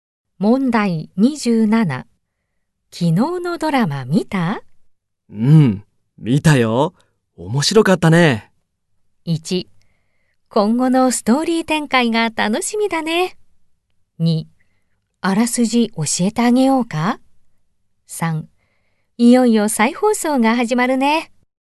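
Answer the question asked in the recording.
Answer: 1: 今後のストーリー展開が楽しみだね。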